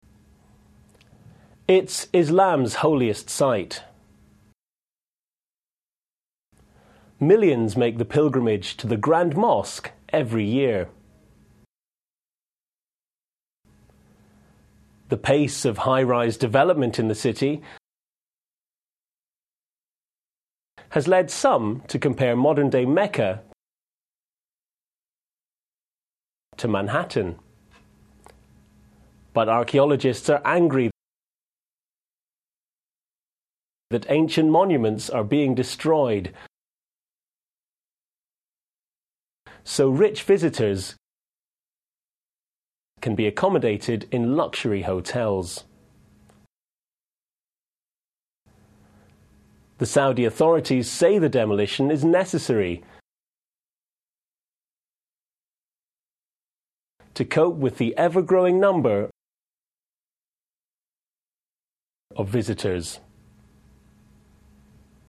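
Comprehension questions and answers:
b - Answer the questions, and check your answers by hovering your mouse over 'Check' (vérifiez vos réponses en passant la souris sur 'Check') :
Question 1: Why do millions of pilgrims go to Mecca every year?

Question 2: What change is taking place now in Mecca?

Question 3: What is Mecca compared to?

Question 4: How do archaeologists react, and why?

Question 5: What has motivated the Saudi authorities to do so?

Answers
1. Because it is Islam's holiest site (the Grand Mosque).
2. Rapid high-rise development.
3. Manhattan
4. They are angry because ancient monuments are being destroyed to build luxury hotels for rich visitors.
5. The need to cope with the ever-growing number of visitors.

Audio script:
Millions make the pilgrimage (2) to the Grand Mosque every year.
The pace (3) of high rise development (4) in the city
has led some to compare modern day Mecca
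to Manhattan.
But archaeologists are angry
that ancient monuments are being destroyed
so rich visitors
can be accomodated in luxury hotels.
The Saudi authorities say the demolition is necessary
to cope with (5) the ever-growing number
of visitors.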